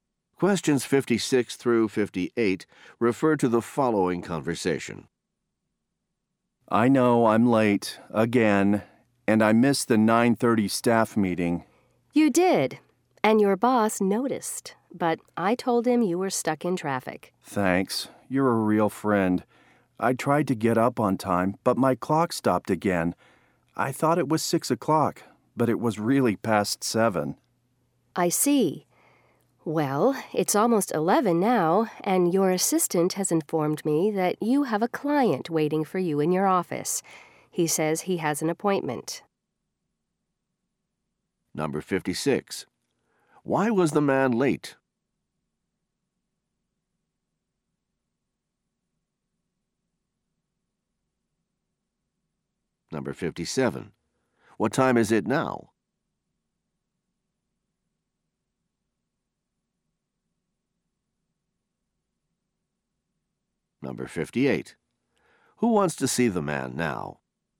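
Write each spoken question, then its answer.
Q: Why was the man late?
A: His clock stopped

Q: What time is it now?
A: Almost 11

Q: Who wants to see the man now?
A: A client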